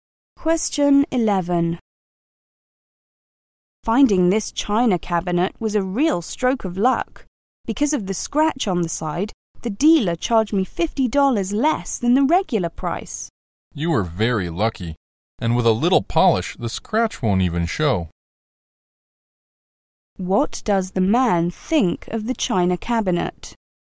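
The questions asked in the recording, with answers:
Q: What does the man think of the china cabinet?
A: It was a lucky bargain; the scratch won't show after polishing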